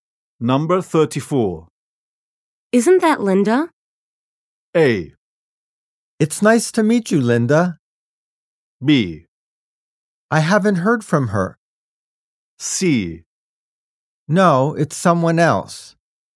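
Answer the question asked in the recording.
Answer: C: No, it's someone else.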